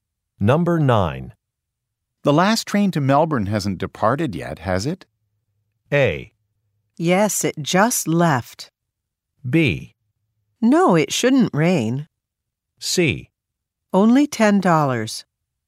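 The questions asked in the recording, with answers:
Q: The last train to Melbourne hasn't departed yet, has it?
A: A: Yes, it just left.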